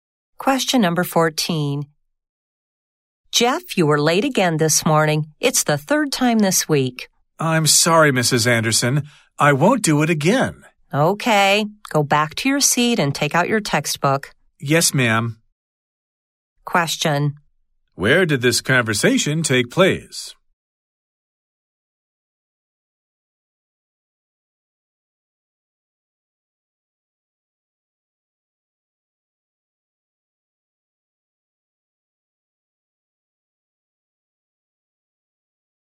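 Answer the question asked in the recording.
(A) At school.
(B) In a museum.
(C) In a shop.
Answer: (A) At school.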